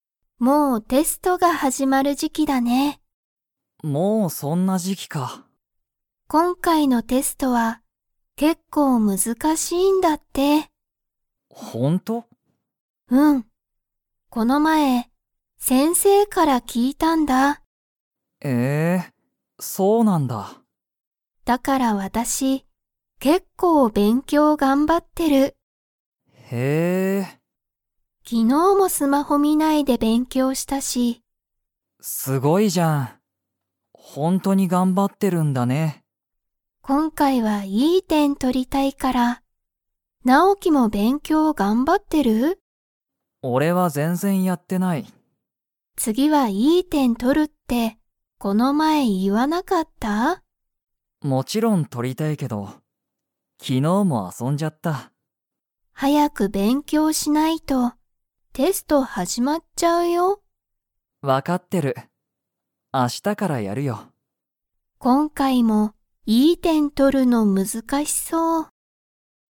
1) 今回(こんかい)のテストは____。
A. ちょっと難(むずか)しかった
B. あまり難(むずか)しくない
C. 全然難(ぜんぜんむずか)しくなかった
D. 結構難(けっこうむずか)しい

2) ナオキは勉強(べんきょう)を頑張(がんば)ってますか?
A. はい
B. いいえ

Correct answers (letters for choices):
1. D
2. B

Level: Level 2